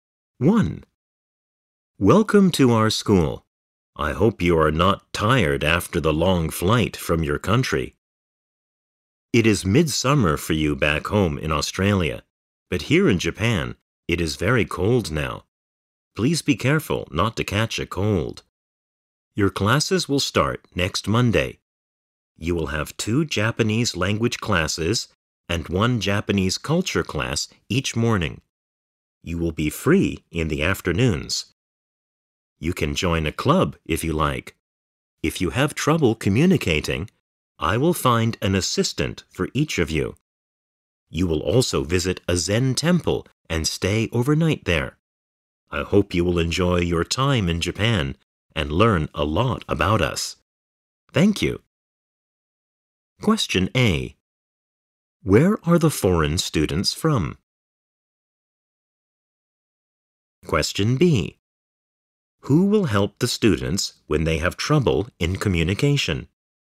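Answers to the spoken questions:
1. Australia
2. An assistant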